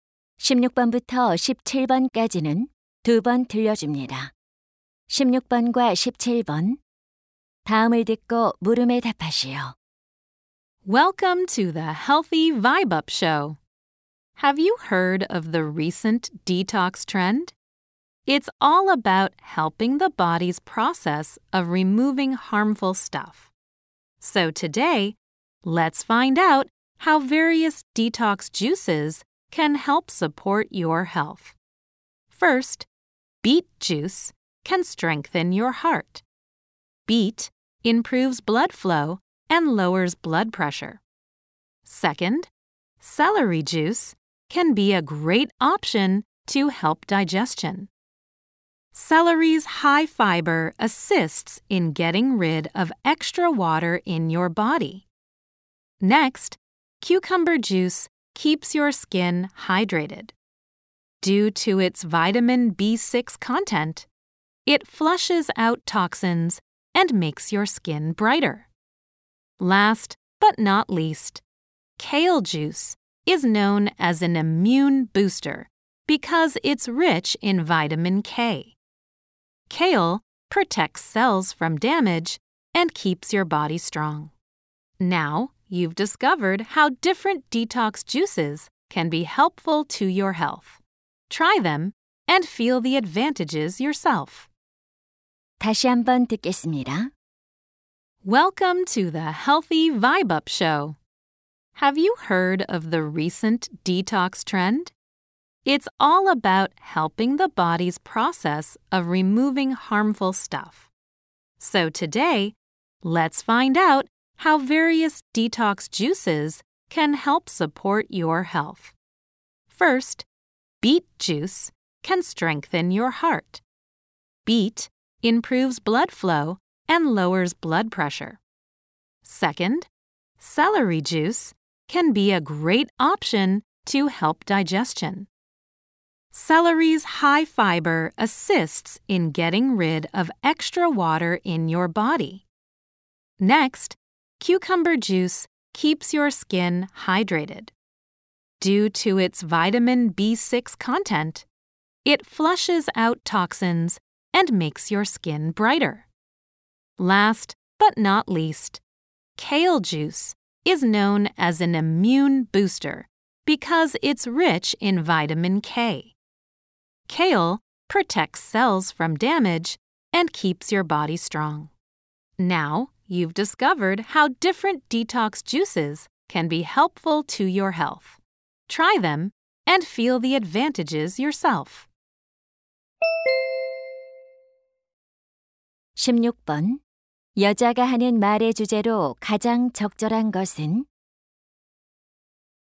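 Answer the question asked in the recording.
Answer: 여러 디톡스 주스가 건강에 주는 이점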